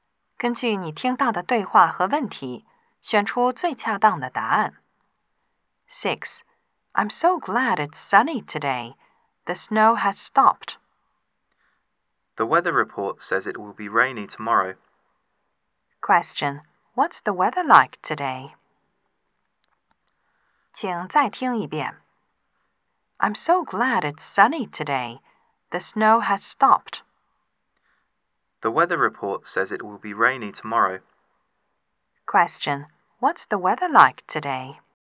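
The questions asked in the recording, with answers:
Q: Question, what's the weather like today?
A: Sunny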